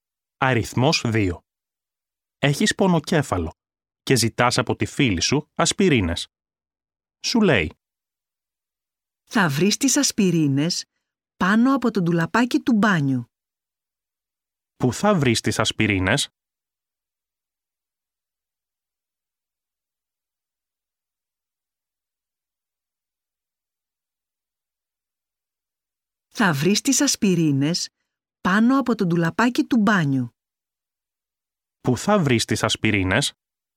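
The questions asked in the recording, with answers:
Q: Πού θα βρεις τις ασπιρίνες?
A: Πάνω από το ντουλαπάκι του μπάνιου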